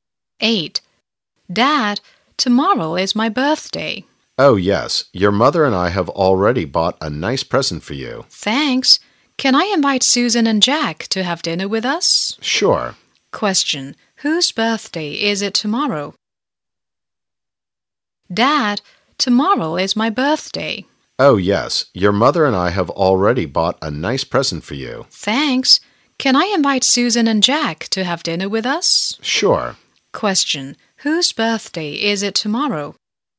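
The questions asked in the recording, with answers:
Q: Whose birthday is it tomorrow?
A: The child's (the speaker talking to Dad)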